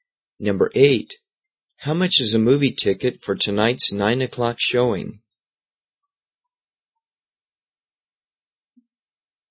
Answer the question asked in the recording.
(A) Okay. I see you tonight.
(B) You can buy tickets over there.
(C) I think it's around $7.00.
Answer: (C) I think it's around $7.00.

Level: 中级